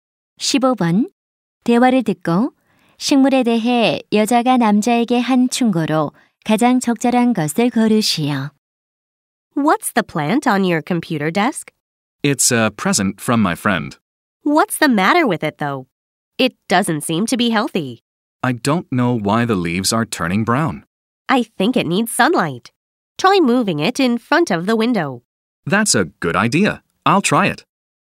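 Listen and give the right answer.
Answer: 창문 앞으로 옮겨 햇빛을 받게 하기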